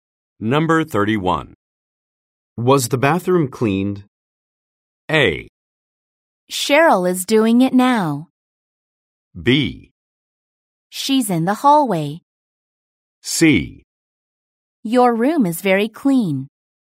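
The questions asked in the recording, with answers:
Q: Was the bathroom cleaned?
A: A: Cheryl is doing it now.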